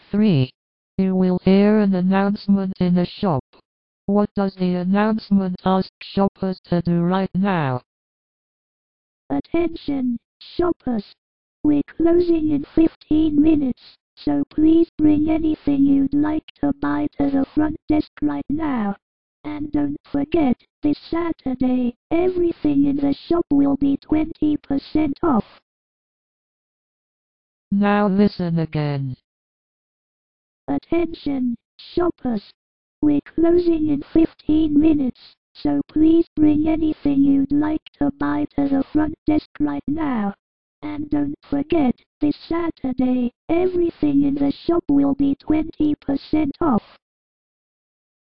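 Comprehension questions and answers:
For each question, choose the correct answer.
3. What does the announcement ask shoppers to do right now?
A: Bring what they want to buy to the front desk

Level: KET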